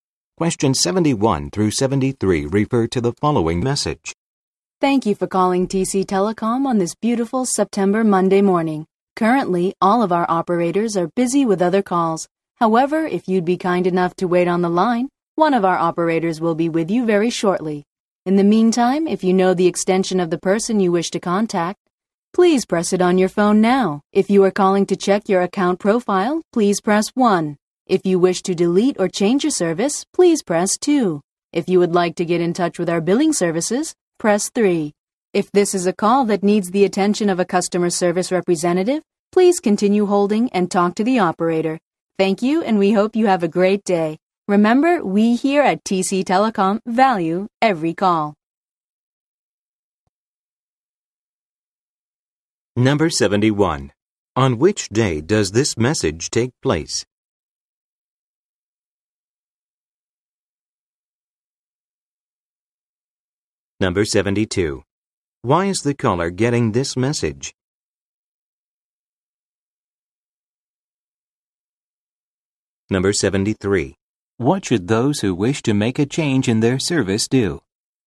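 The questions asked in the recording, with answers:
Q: On which day does this message take place?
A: Monday

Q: Why is the caller getting this message?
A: All operators are busy with other calls

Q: What should those who wish to make a change in their service do?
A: Press 2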